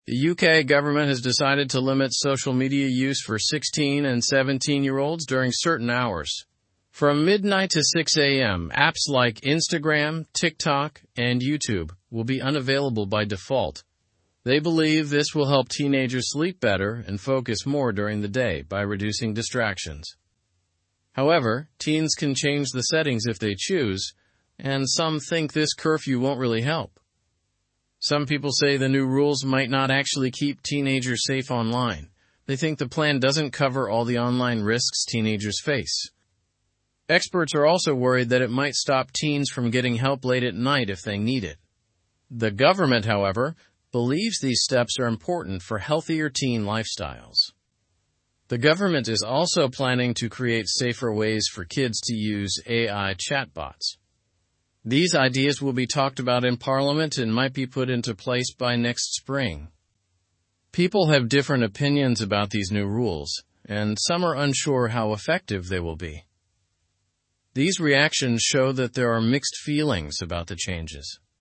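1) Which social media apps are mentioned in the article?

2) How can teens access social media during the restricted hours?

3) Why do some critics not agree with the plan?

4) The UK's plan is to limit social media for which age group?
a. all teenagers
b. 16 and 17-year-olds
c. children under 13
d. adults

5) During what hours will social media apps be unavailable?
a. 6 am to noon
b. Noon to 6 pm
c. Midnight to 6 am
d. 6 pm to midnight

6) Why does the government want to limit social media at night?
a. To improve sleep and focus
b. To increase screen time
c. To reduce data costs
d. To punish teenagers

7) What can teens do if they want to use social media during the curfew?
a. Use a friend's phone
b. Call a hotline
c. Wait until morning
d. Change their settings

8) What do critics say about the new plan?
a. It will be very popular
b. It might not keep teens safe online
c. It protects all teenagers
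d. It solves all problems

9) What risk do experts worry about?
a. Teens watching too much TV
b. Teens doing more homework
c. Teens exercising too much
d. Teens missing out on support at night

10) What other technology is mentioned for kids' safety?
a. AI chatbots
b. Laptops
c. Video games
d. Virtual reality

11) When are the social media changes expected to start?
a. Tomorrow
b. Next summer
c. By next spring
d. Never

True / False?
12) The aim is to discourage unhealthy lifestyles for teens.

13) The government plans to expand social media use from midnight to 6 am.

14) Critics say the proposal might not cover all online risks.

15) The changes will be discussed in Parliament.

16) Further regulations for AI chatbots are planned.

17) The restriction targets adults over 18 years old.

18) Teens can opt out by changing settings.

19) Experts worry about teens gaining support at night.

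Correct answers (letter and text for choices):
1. Instagram, TikTok, and YouTube are mentioned.
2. They can opt out by changing the default settings.
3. They believe it doesn't address all online risks.
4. b. 16 and 17-year-olds
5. c. Midnight to 6 am
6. a. To improve sleep and focus
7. d. Change their settings
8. b. It might not keep teens safe online
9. d. Teens missing out on support at night
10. a. AI chatbots
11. c. By next spring
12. True
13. False
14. True
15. True
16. True
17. False
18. True
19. False

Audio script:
The UK government has decided to limit social media use for 16 and 17-year-olds during certain hours. From midnight to 6 am, apps like Instagram, TikTok, and YouTube will be unavailable by default. They believe this will help teenagers sleep better and focus more during the day by reducing distractions. However, teens can change the settings if they choose, and some think this curfew won't really help.
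Some people say the new rules might not actually keep teenagers safe online. They think the plan doesn't cover all the online risks teenagers face. Experts are also worried that it might stop teens from getting help late at night if they need it. The government, however, believes these steps are important for healthier teen lifestyles.
The government is also planning to create safer ways for kids to use AI chatbots. These ideas will be talked about in Parliament and might be put into place by next spring. People have different opinions about these new rules, and some are unsure how effective they will be.

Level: Level 2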